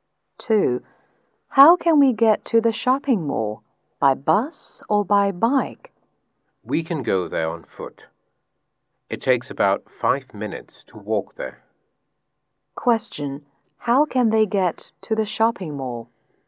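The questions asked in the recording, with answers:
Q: How can they get to the shopping mall?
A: On foot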